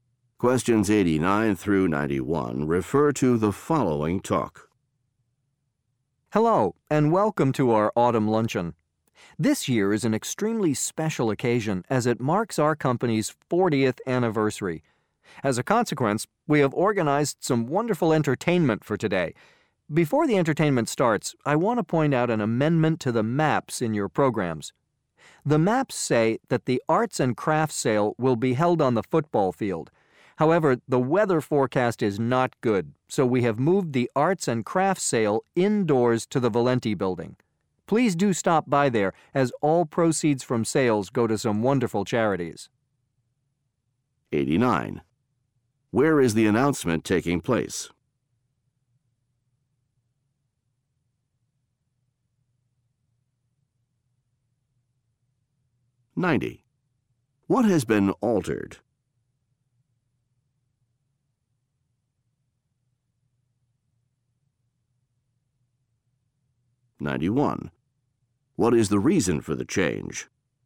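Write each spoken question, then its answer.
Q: Where is the announcement taking place?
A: At a company's autumn luncheon

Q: What has been altered?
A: The location of the arts and crafts sale

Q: What is the reason for the change?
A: Bad weather forecast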